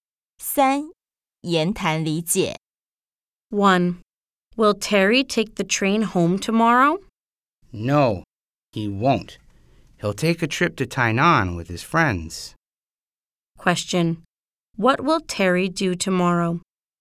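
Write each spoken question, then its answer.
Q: What will Terry do tomorrow?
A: Take a trip to Tainan with his friends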